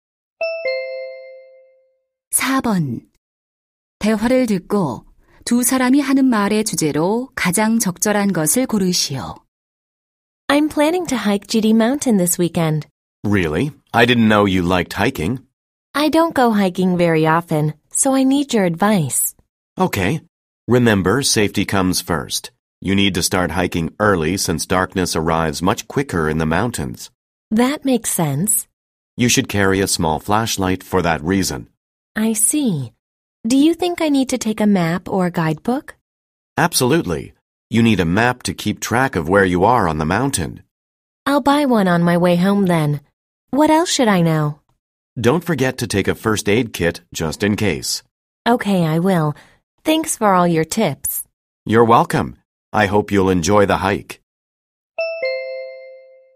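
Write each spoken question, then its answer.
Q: 대화를 듣고 두 사람이 하는 말의 주제로 가장 적절한 것을 고르시오.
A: 안전한 등산을 위한 조언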